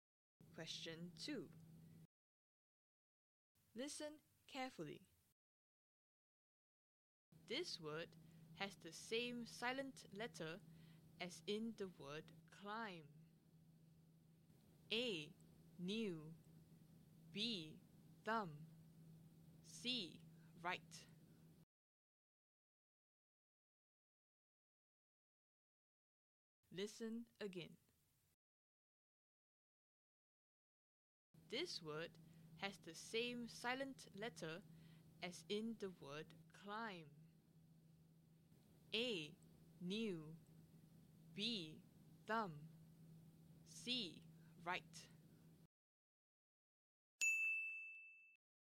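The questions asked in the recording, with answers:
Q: This word has the same silent letter as in the word climb.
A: B: Thumb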